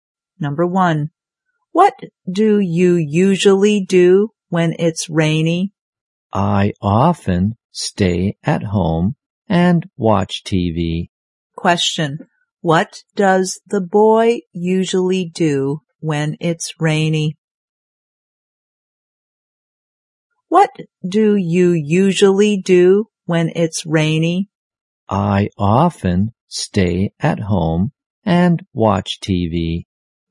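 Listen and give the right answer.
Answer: He stays at home and watches TV.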